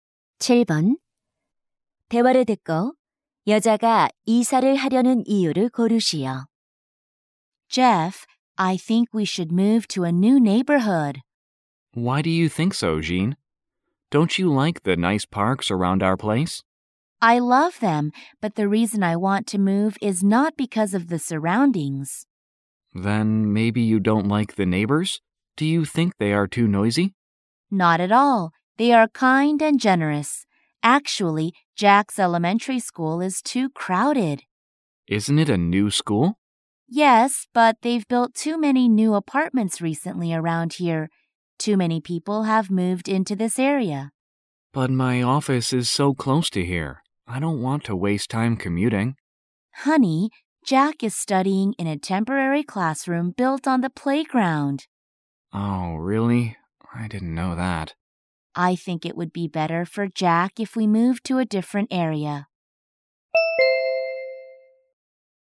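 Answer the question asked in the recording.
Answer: 아들의 초등학교가 너무 붐벼서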